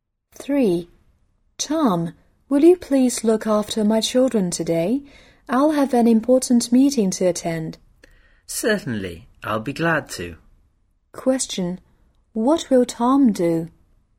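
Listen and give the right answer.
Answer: Look after the children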